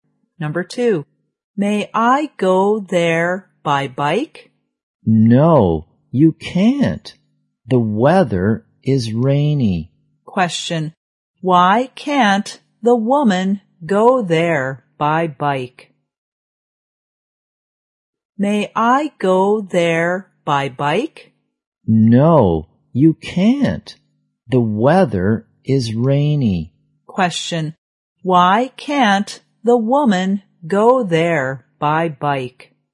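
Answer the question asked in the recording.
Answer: Because it is rainy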